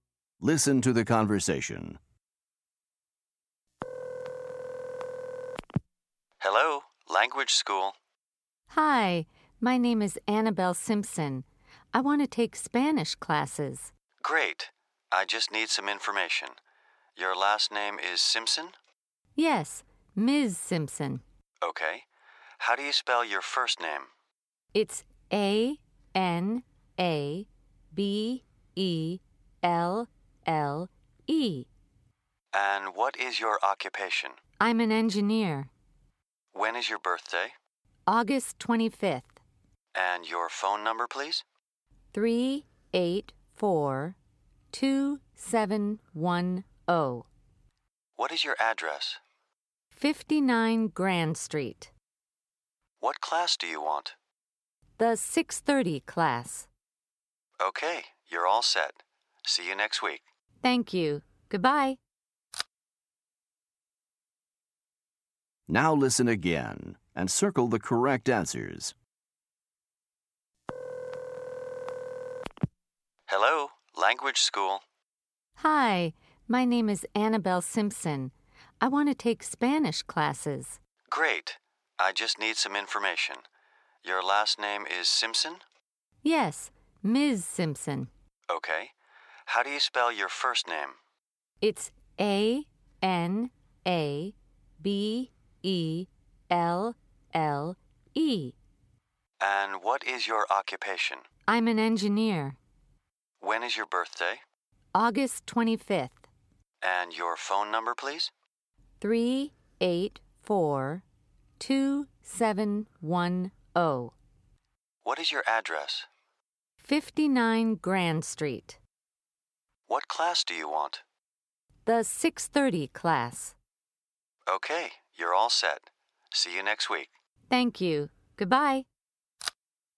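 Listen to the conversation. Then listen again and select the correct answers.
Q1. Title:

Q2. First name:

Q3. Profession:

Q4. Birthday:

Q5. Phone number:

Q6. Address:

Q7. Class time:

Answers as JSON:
{"1": "Ms.", "2": "Annabelle", "3": "engineer", "4": "August 25th", "5": "384-2710", "6": "59 Grand Street", "7": "6:30"}

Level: Top Notch Fundamentals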